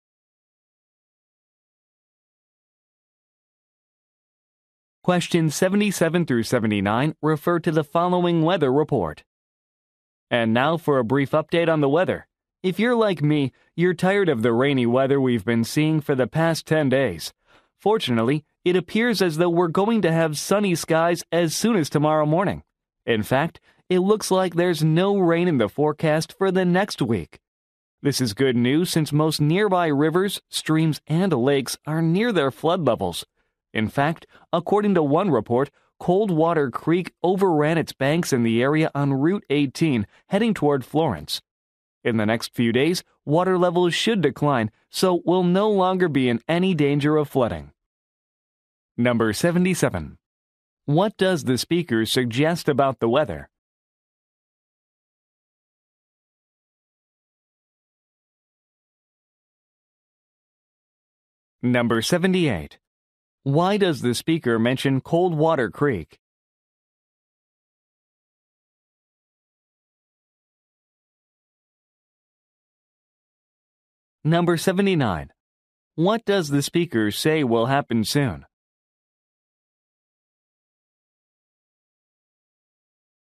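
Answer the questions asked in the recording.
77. It will be sunny with no rain for a week
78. It overflowed its banks
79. Water levels will decline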